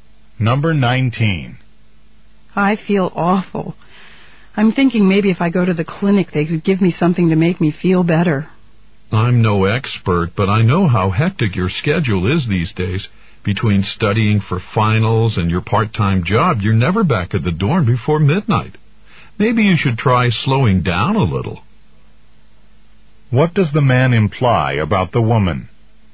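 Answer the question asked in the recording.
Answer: She's overworked and needs to slow down.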